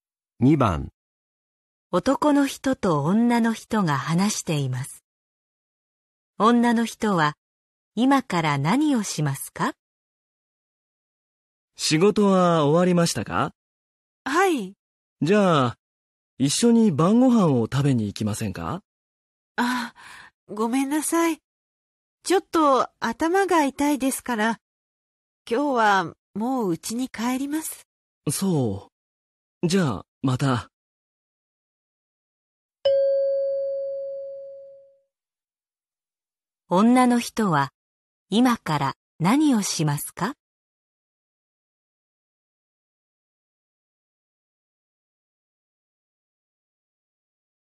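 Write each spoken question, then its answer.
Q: 何をしますか?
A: 家に帰る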